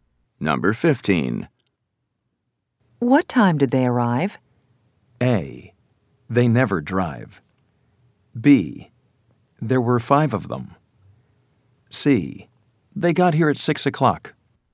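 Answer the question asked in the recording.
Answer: C: They got here at 6 o'clock.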